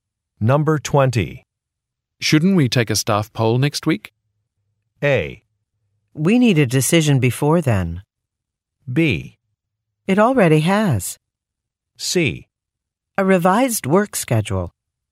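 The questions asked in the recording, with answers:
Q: Shouldn't we take a staff poll next week?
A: A: We need a decision before then.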